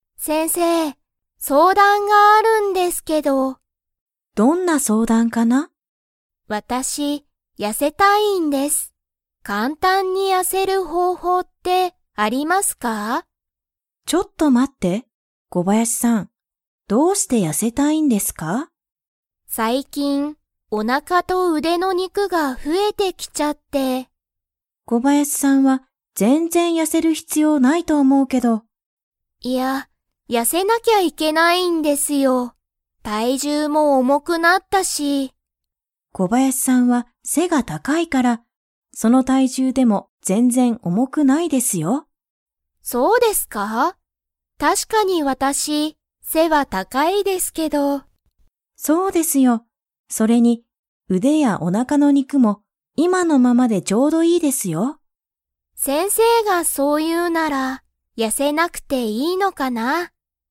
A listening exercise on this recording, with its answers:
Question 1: 小林こばやしさんは、簡単かんたんに 方法ほうほうが知しりたい。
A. 肉にくが増ふえる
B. 背せが高たかくなる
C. 痩やせる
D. 今いまのままでいる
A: 痩やせる

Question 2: 小林こばやしさんは、背せが 。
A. 高たかい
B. 低ひくい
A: 高たかい

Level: Level 4

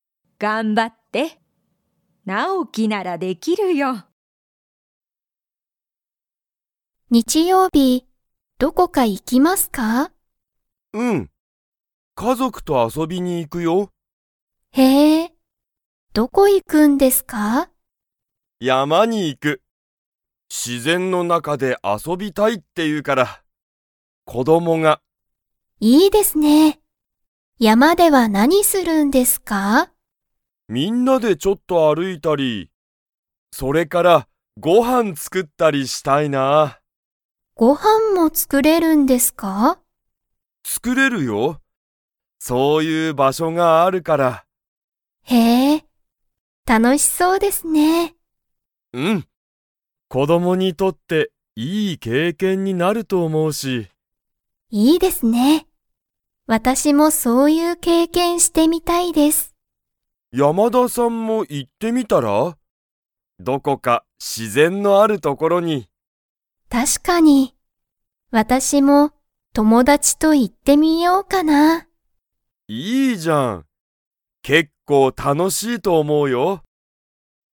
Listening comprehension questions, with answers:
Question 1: 斎藤(さいとう)さんは、日曜日(にちようび)に家族(かぞく)と遊(あそ)びに行(い)きますか?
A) はい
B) いいえ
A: はい

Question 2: 山やまに行いくのは、子供(こども)にとって____になると思(おも)う。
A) 美味(おい)しいご飯(はん)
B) 大おおきい自然(しぜん)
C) 家族(かぞく)の山(やま)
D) いい経験(けいけん)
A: いい経験(けいけん)

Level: Level 2

